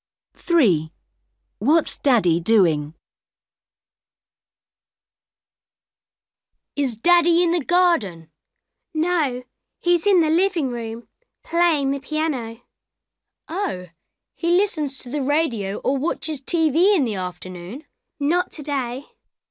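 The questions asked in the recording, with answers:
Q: What's Daddy doing?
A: playing the piano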